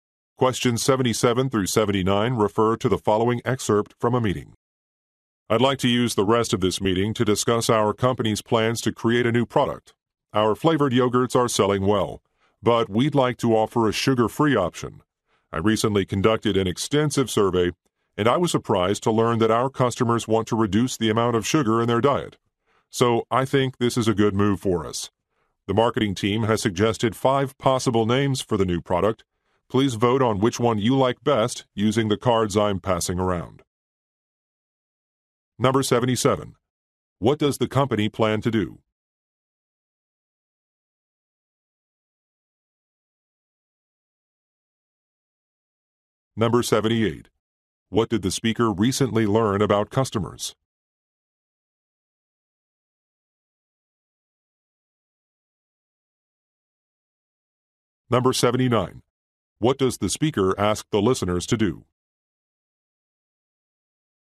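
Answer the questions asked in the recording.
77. Create a sugar-free yogurt
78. They want to reduce sugar in their diet
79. Vote on a product name using cards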